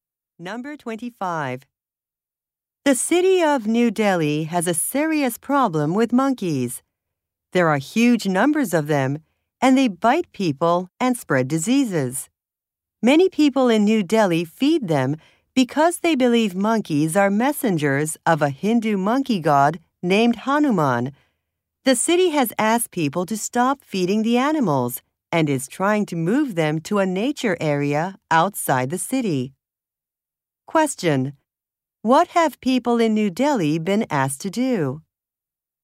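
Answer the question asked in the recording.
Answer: Stop feeding the monkeys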